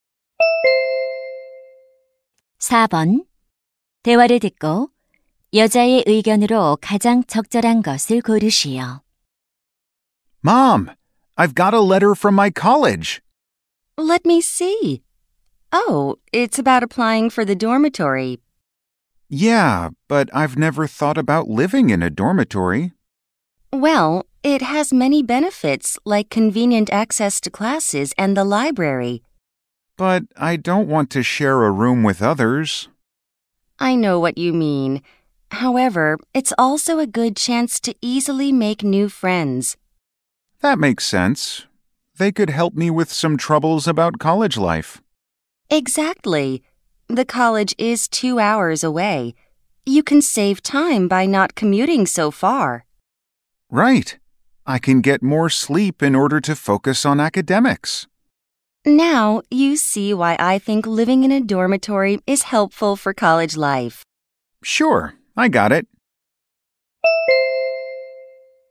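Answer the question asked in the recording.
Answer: 기숙사 생활은 대학 생활에 도움이 된다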